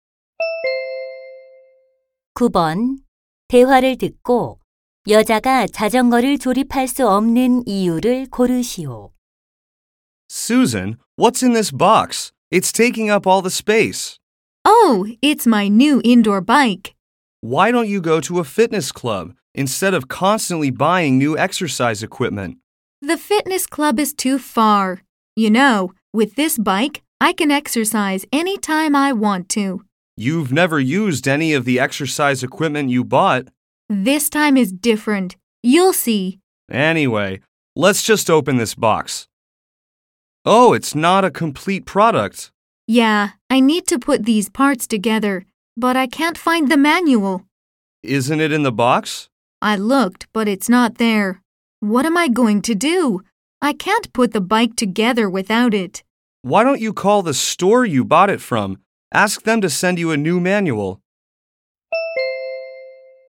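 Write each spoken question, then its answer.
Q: 대화를 듣고 여자가 자전거를 조립할 수 없는 이유를 고르시오.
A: 설명서를 찾을 수 없어서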